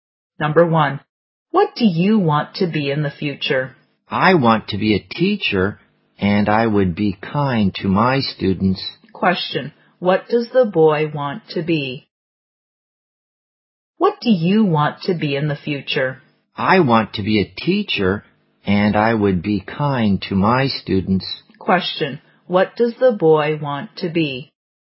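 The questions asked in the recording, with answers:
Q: Question, what does the boy want to be?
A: A teacher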